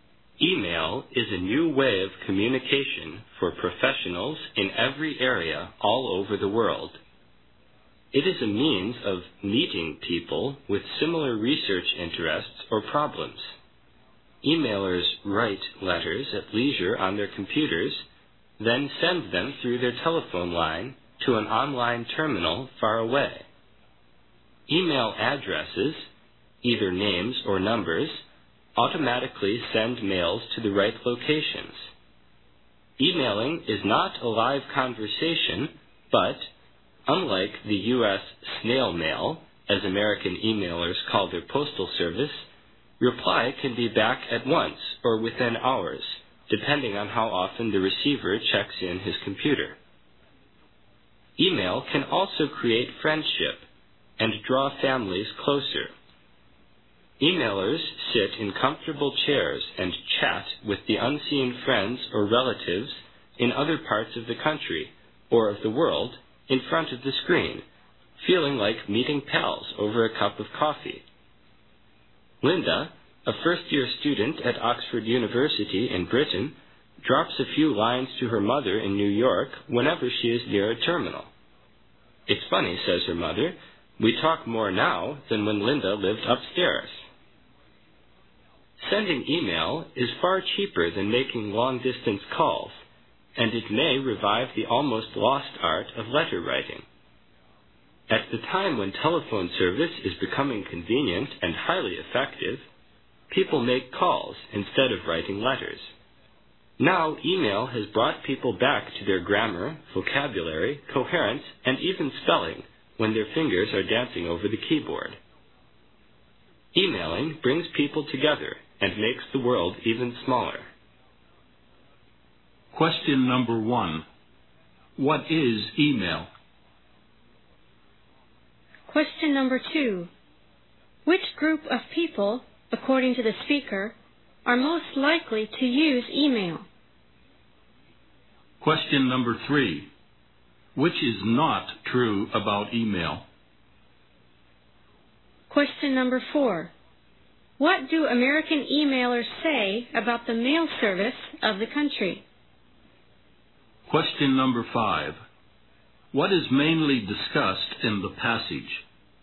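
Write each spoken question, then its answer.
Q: What is email?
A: A new way of communication

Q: Which group of people, according to the speaker, are most likely to use email?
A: Professionals

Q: What do American emailers say about the mail service of the country?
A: They call it snail mail

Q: What is mainly discussed in the passage?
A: The advantages of email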